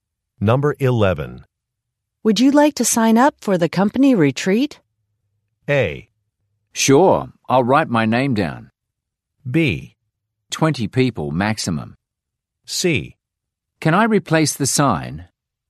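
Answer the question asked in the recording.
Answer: A: Sure, I'll write my name down.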